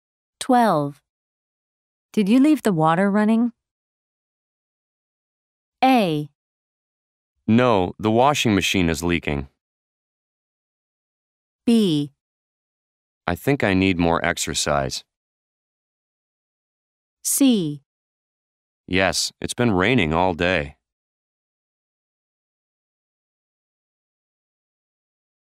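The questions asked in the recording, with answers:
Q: Did you leave the water running?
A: A: No, the washing machine is leaking.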